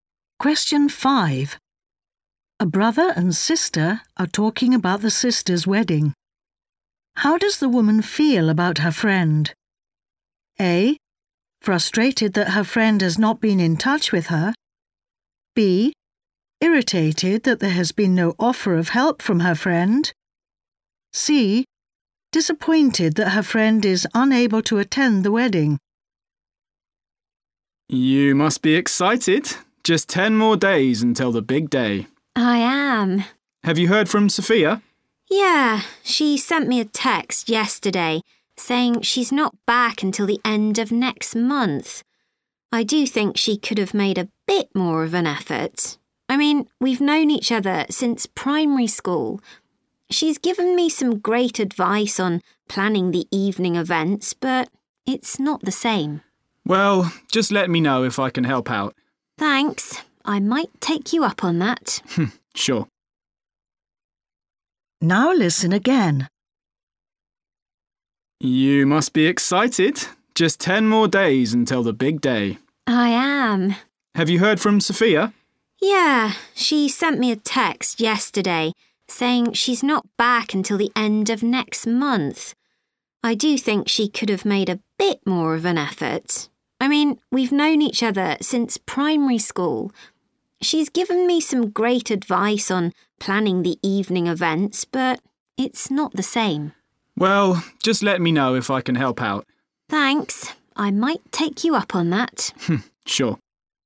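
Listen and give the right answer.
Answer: C: Disappointed that her friend is unable to attend the wedding.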